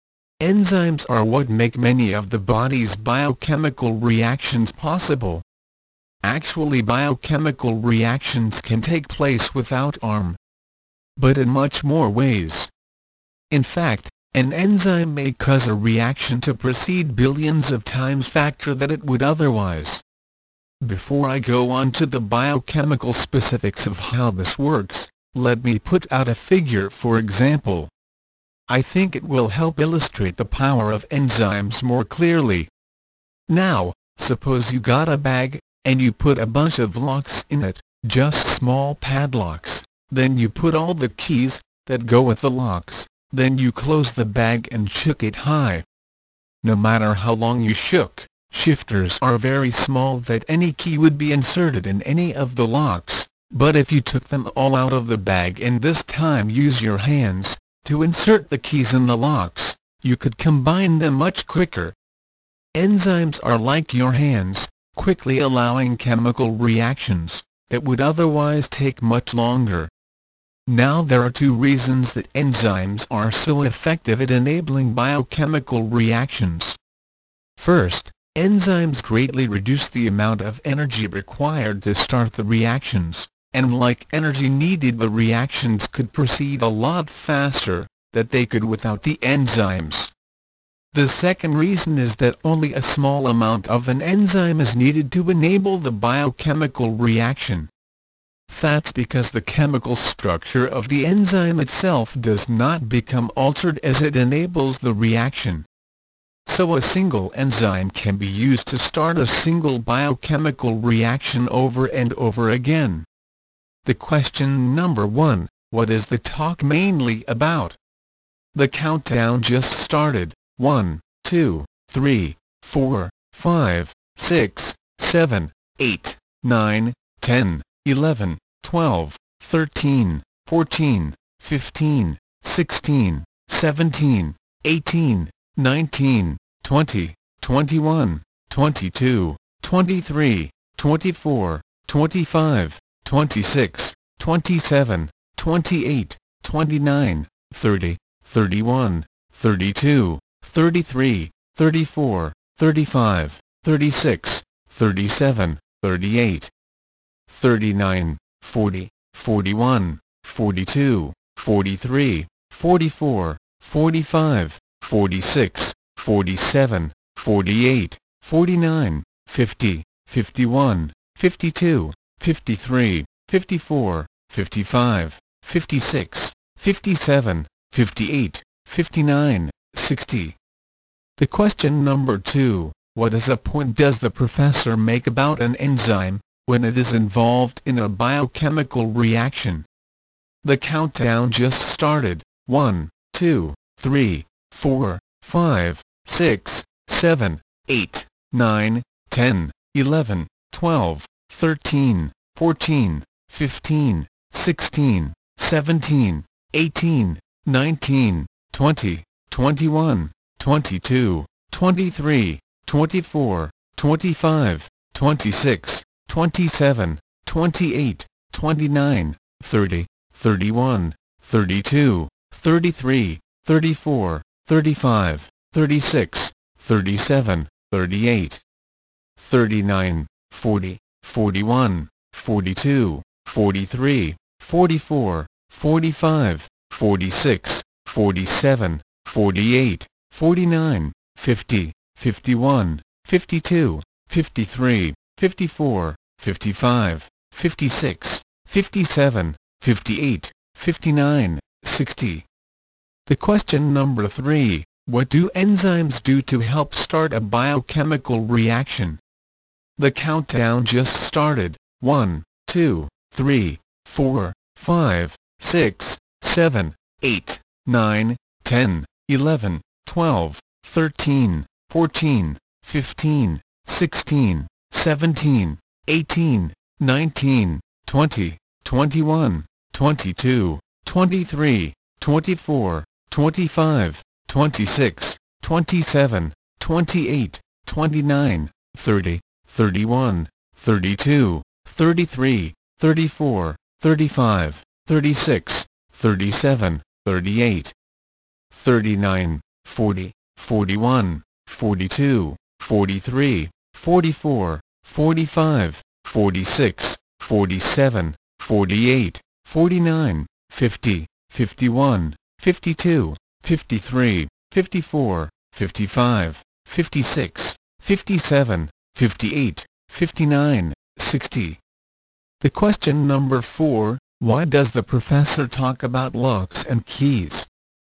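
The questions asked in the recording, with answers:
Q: what is the talk mainly about?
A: How enzymes make biochemical reactions in the body happen faster

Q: what is a point does the professor make about an enzyme when it is involved in a biochemical reaction?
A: Its chemical structure does not change, so it can be used over and over

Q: what do enzymes do to help start a biochemical reaction?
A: They greatly reduce the energy needed to start the reaction

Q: why does the professor talk about locks and keys?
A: To show how much faster enzymes make reactions happen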